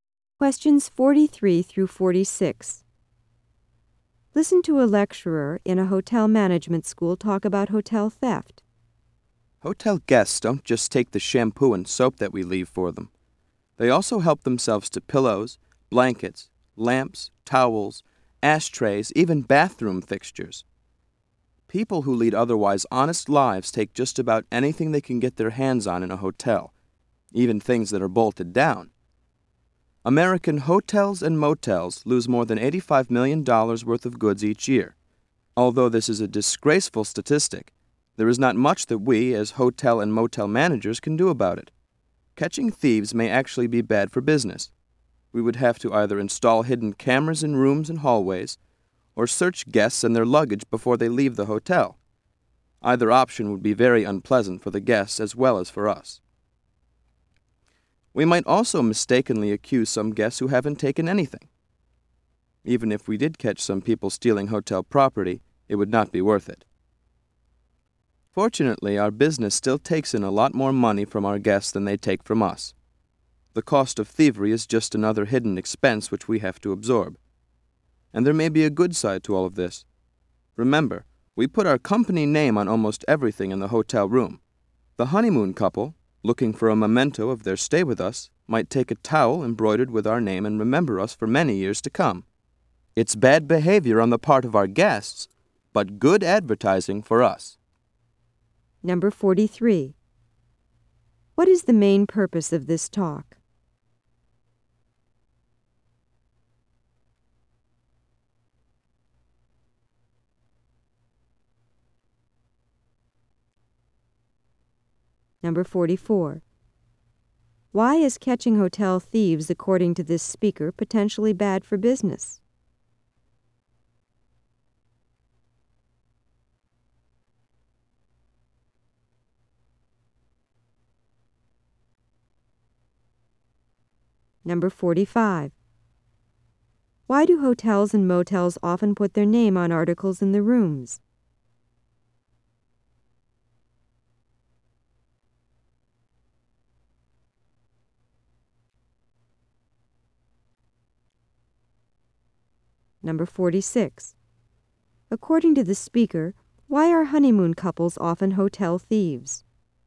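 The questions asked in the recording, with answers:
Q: What is the main purpose of this talk?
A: To discuss theft by hotel guests

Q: Why is catching hotel thieves, according to this speaker, potentially bad for business?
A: It would be unpleasant for guests, and innocent guests might be accused

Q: Why do hotels and motels often put their name on articles in the rooms?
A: As advertising

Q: According to the speaker, why are honeymoon couples often hotel thieves?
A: They want a memento of their stay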